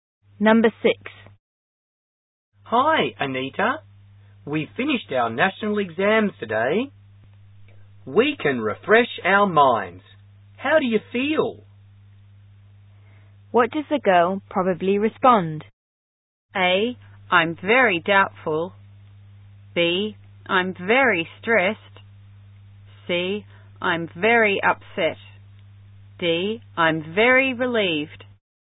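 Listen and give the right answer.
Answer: D: I'm very relieved.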